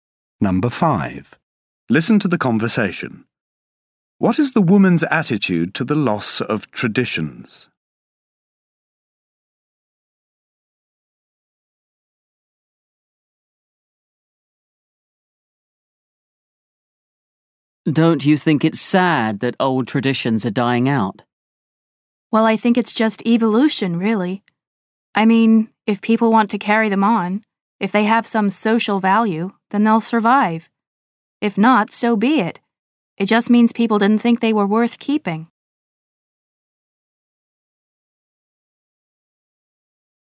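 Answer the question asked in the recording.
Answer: She accepts it as natural evolution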